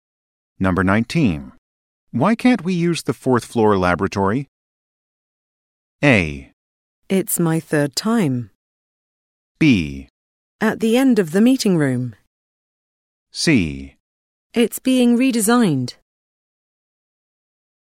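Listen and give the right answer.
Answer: C: It's being redesigned.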